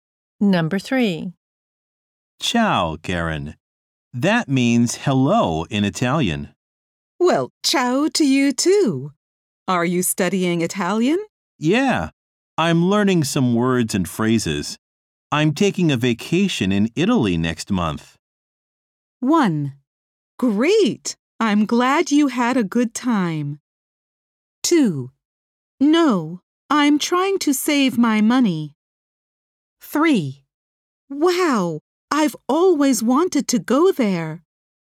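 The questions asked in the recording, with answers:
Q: I'm taking a vacation in Italy next month.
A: 3: Wow! I've always wanted to go there!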